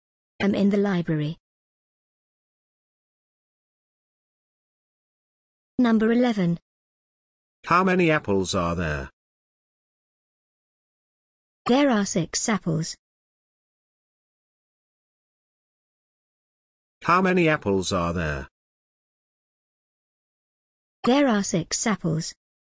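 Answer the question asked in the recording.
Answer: 6 apples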